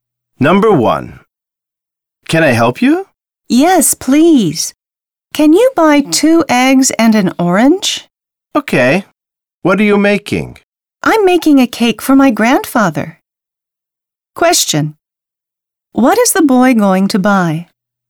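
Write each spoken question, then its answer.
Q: What is the boy going to buy?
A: Two eggs and an orange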